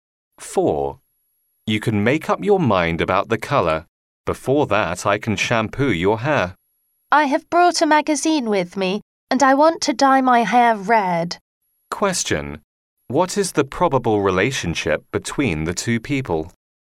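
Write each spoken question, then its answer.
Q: What is the probable relationship between the two people?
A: Hairdresser and customer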